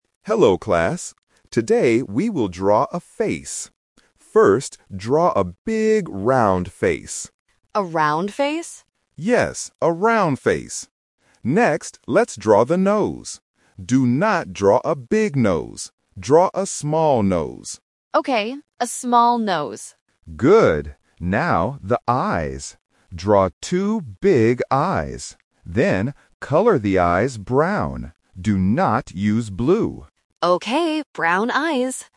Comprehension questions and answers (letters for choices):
Listen to the teacher and choose the correct answer (A, B, or C).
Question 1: What kind of face do the students draw?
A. A small face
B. A round face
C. A long face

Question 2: What does the teacher say about the nose?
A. Draw a small nose.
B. Draw a big nose.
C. Draw a long nose.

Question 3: What color are the eyes?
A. Blue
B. Black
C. Brown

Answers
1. B
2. A
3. C

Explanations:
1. The teacher clearly instructs the class: "First, draw a big, round face." Why the trap is wrong: Option (A) A small face is a trap because the word "small" is used later in the audio for the nose, not the face. Option (C) A long face is not mentioned at all.
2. The teacher says: "Draw a small nose." Why the trap is wrong: Option (B) Draw a big nose is a trap. The teacher mentions the word "big" but says "Do not draw a big nose." Option (C) Draw a long nose is plausible when drawing, but it is not in the audio.
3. The teacher tells the students to "color the eyes brown" and the student confirms, "Okay, brown eyes!" Why the trap is wrong: Option (A) Blue is a trap because the teacher explicitly says, "Do not use blue." Option (B) Black is a common eye color but is never mentioned.

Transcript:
Teacher: Hello class. Today, we will draw a face. First, draw a big, round face.
Student: A round face?
Teacher: Yes, a round face. Next, let's draw the nose. Do not draw a big nose.
Student: Okay, a small nose.
Teacher: Good. Now, the eyes. Draw two big eyes. Then, color the eyes brown. Do not use blue.